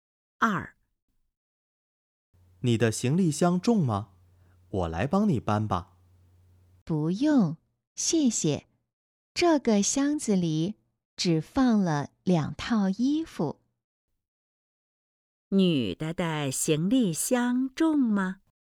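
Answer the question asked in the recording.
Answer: 不重,只放了两套衣服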